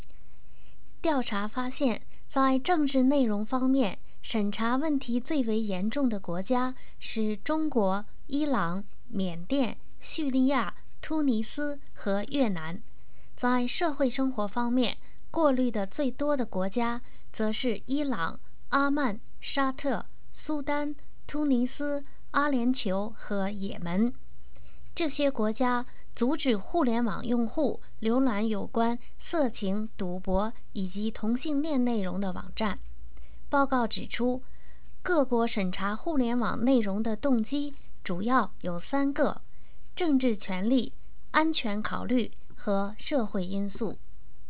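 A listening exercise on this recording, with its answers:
Please answer the following questions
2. What were the main motives of those countries for their internet censorship?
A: Political power, security concerns and social factors

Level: M.Phil Year 2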